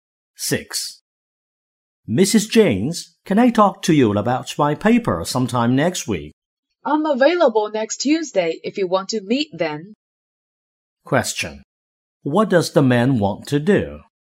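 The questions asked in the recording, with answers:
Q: What does the man want to do?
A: Talk with Mrs. James about his paper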